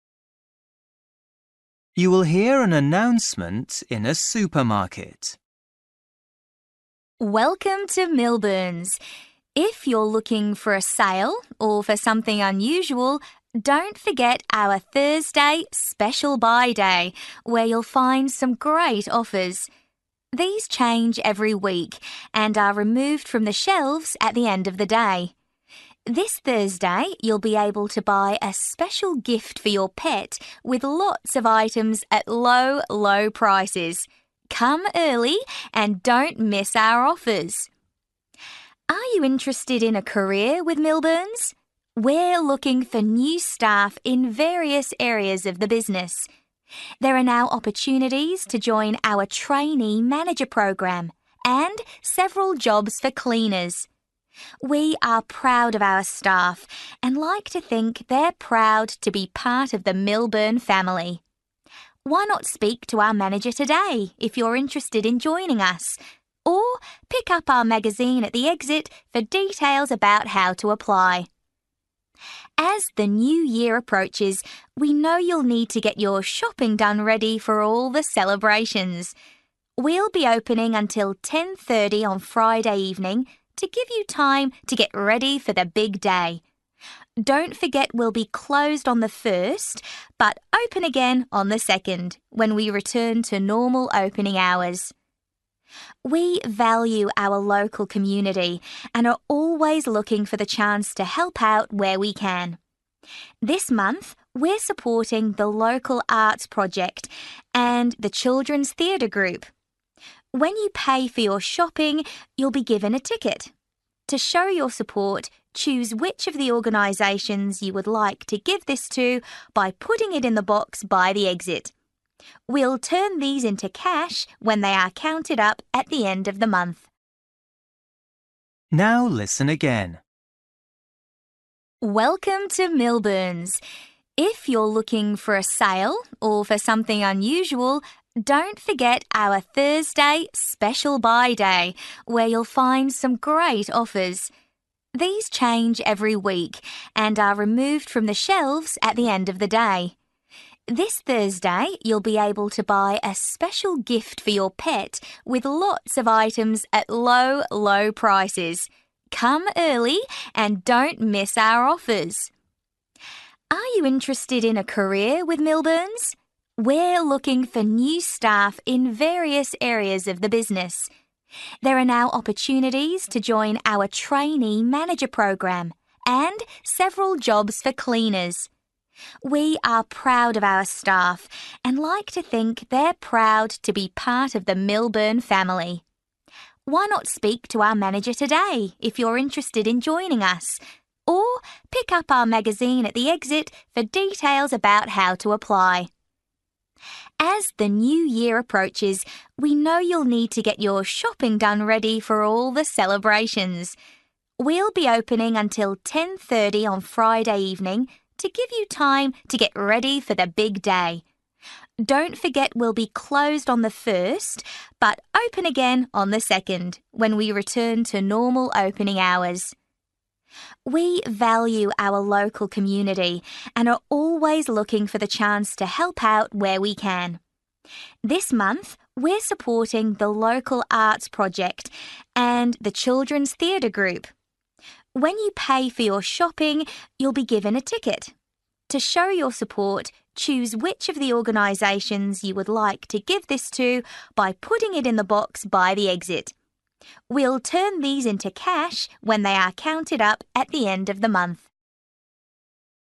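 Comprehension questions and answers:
For each question, write the correct answer in the gap. Write one or two words or a number or a date or a time. You will hear an announcement in a supermarket.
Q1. At this Thursday's 'Special Buy' day you can get something for your (1)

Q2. There are jobs available for trainee managers and (2)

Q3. Collect a (3) by the exit for information about how to apply.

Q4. On Friday the supermarket will open until (4)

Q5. This month Milburn's are supporting the local Arts Project and (5) Group.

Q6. You will be given a (6) when you pay to show your support.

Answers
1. pet
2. cleaners
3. magazine
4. 10:30
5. Children's Theatre
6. ticket

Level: Luyện nghe trình độ B1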